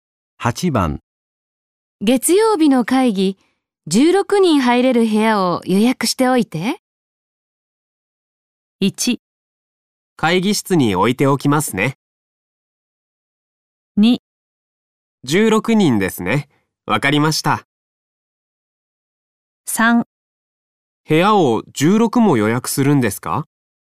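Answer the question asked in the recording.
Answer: 2: 16人ですね。わかりました。

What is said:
1
会議室においておきますね。
2
16人ですね、分かりました。
3
部屋を16も予約するんですか。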